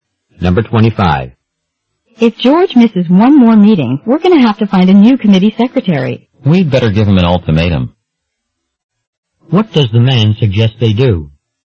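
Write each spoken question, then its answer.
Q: What does the man suggest they do?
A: Warn George one last time that he must come to meetings.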